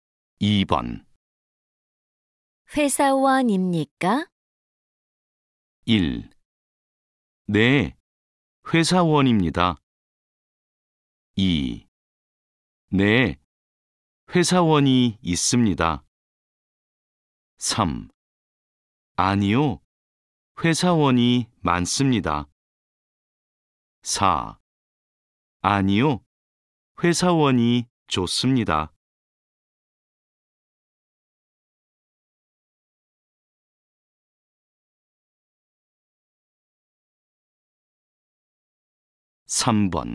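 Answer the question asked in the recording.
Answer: 1: 네, 회사원입니다.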